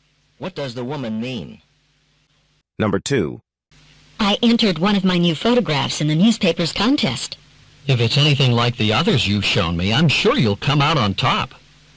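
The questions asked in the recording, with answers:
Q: What does the man mean?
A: He thinks the woman's photograph will win the contest.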